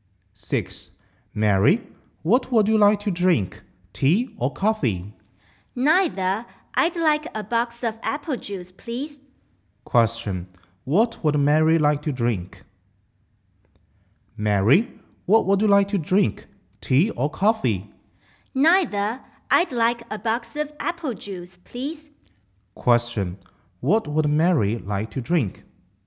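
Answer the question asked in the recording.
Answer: Apple juice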